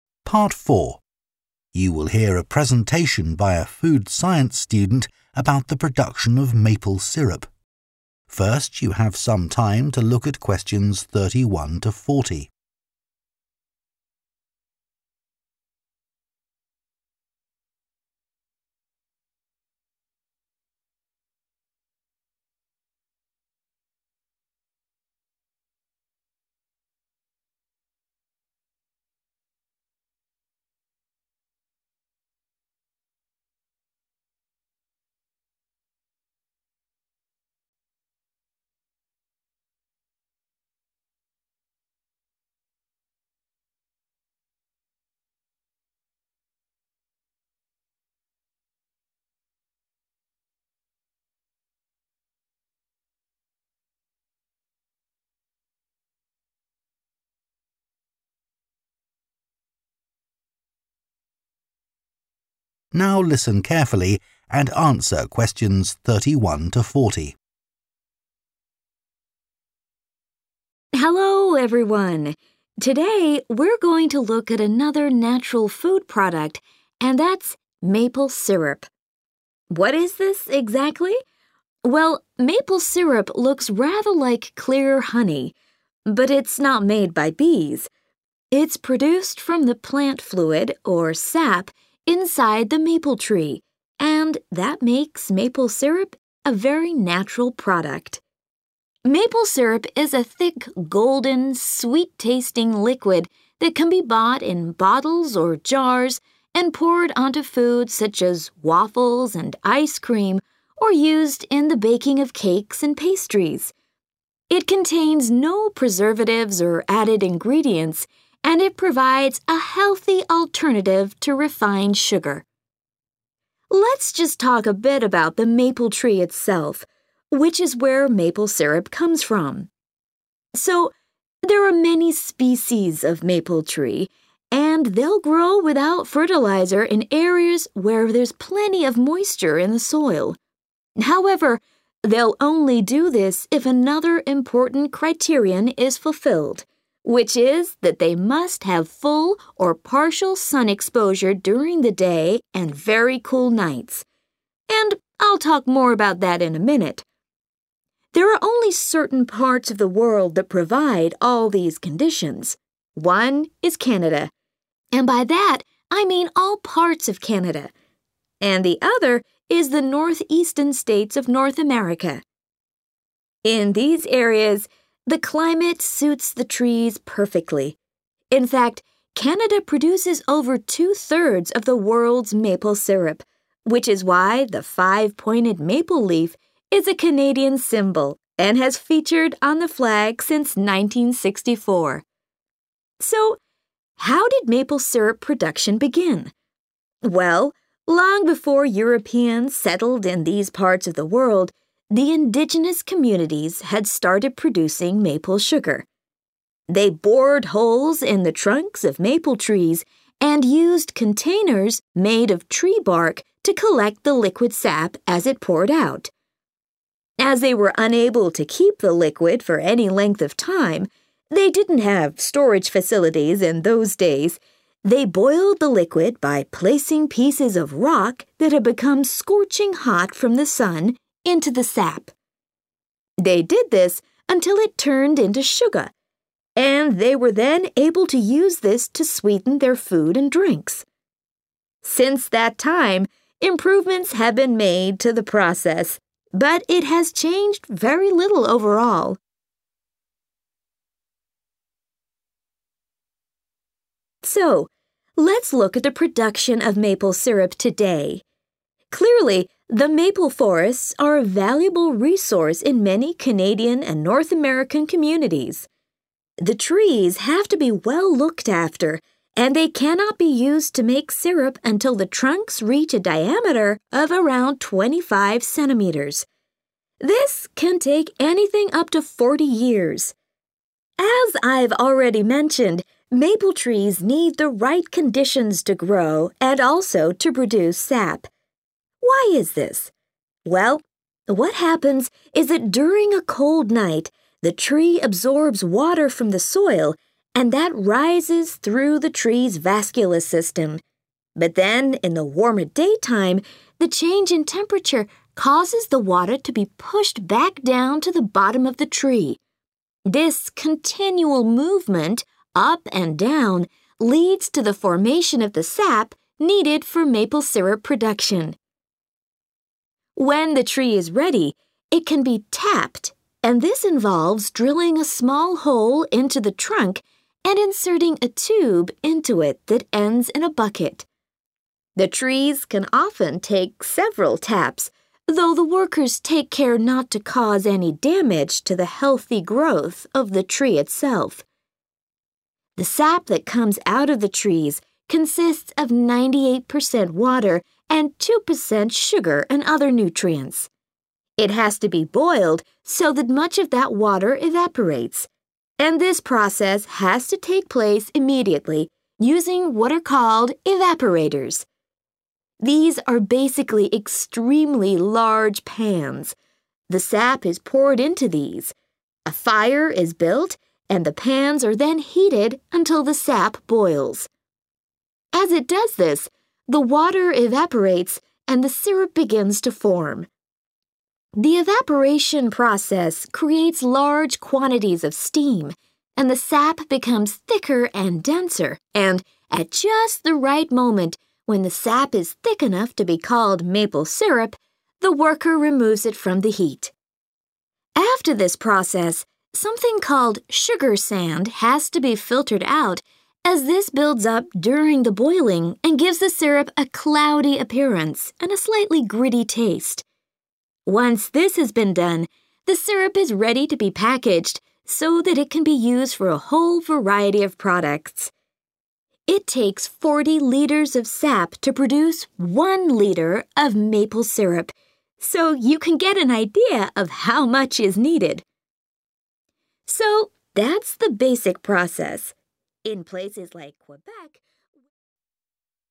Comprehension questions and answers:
Complete the notes below. Write ONE WORD ONLY for each answer.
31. + colour described as 31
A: golden

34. + used hot 34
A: rock

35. + Tree trunks may not have the correct 35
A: diameter

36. + A tap is drilled into the trunk and a 36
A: tube

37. + Large pans of sap called evaporators are heated by means of a 37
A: fire

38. + A lot of 38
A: steam

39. + 'Sugar sand' is removed because it makes the syrup look 39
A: cloudy

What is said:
Hello everyone. Today we're going to look at another natural food product and that's maple syrup. What is this exactly? Well, maple syrup looks rather like clear honey, but it's not made by bees; it's produced from the plant fluid – or sap – inside the maple tree and that makes maple syrup a very natural product. Maple syrup is a thick, golden, sweet-tasting liquid [Xi-rô phong là một chất lỏng đặc, màu vàng, có vị ngọt] (Question 31) that can be bought in bottles or jars and poured onto food such as waffles and ice cream or used in the baking of cakes and pastries.
Let's just talk a bit about the maple tree itself, which is where maple syrup comes from. So, there are many species of maple tree, and they'll grow without fertiliser in areas where there's plenty of moisture in the soil. However, they'll only do this if another important criterion is fulfilled, which is that they must have full or partial sun exposure during the day and very cool nights – and I'll talk more about that in a minute. There are only certain parts of the world that provide all these conditions: one is Canada, and by that, I mean all parts of Canada, and the other is the north-eastern states of North America. In fact, Canada produces over two-thirds of the world's maple syrup, which is why the five-pointed maple leaf is a Canadian symbol and has featured on the flag since 1964.
So how did maple syrup production begin? Well, long before Europeans settled in these parts of the world, the indigenous communities had started producing maple sugar. They bored holes in the trunks of maple trees and used containers made of tree bark to collect the liquid sap as it poured out. As they were unable to keep the liquid for any length of time – they didn't have storage facilities in those days – they boiled the liquid [=heat the sap] by placing pieces of rock that had become scorching hot from the sun into the sap [họ đã đun sôi nhựa cây bằng cách đặt những viên đá đã trở nên rất nóng bằng ánh sáng mặt trời vào nhựa cây] (Question 34). They did this until it turned into sugar, and they were then able to use this to sweeten their food and drinks. Since that time, improvements have been made to the process, but it has changed very little overall.
So let's look at the production of maple syrup today. Clearly, the maple forests are a valuable resource in many Canadian and North American communities. This can take anything up to 40 years. As I've already mentioned, maple trees need the right conditions to grow and also to produce sap. Why is this? Well, what happens is that during a cold night, the tree absorbs water from the soil, and that rises through the tree's vascular system. But then in the warmer daytime, the change in temperature causes the water to be pushed back down to the bottom of the tree. This continual movement – up and down – leads to the formation of the sap needed for maple syrup production.
The trees can often take several taps, though the workers take care not to cause any damage to the healthy growth of the tree itself. The sap that comes out of the trees consists of 98 percent water and 2 percent sugar and other nutrients. It has to be boiled so that much of that water evaporates, and this process has to take place immediately, using what are called evaporators. As it does this, the water evaporates, and the syrup begins to form. The evaporation process creates large quantities of [=a lot of] steam [Quá trình bay hơi tạo ra một lượng lớn hơi nước] (Question 38), and the sap becomes thicker and denser, and, at just the right moment, when the sap is thick enough to be called maple syrup, the worker removes it from the heat.